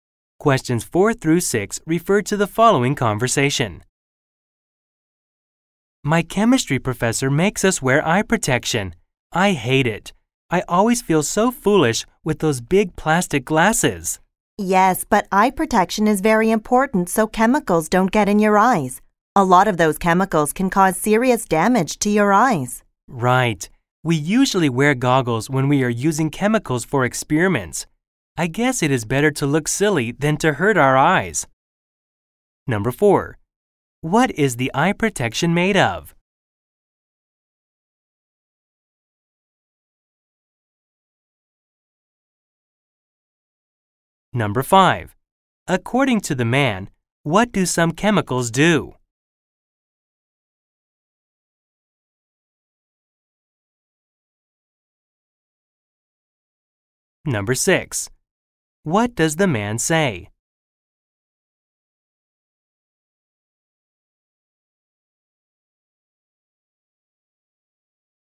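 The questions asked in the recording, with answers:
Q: What is the eye protection made of?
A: Plastic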